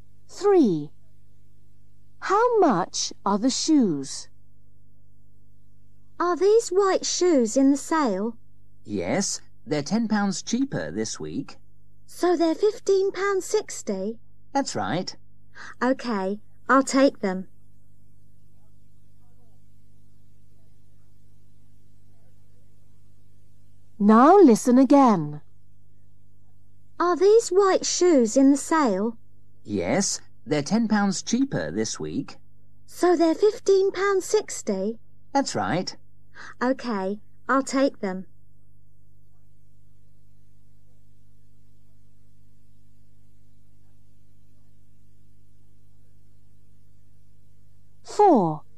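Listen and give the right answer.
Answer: £15.60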